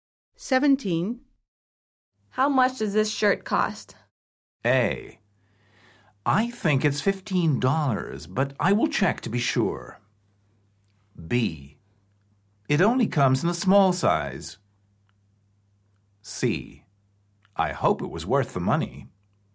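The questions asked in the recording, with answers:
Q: How much does this shirt cost?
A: A: I think it's $15, but I will check to be sure.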